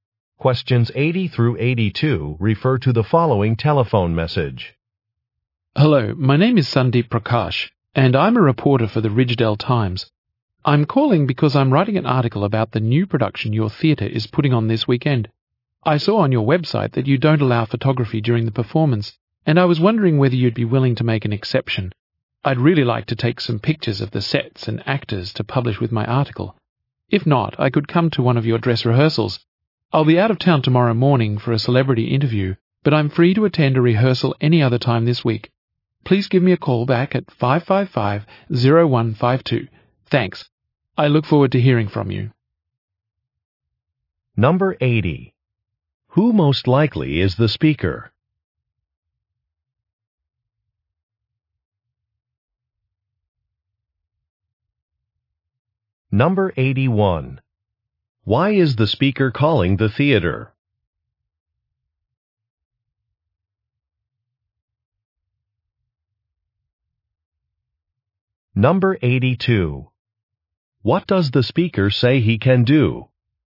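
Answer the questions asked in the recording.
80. A newspaper reporter
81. To ask permission to take photographs during the performance
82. Attend a dress rehearsal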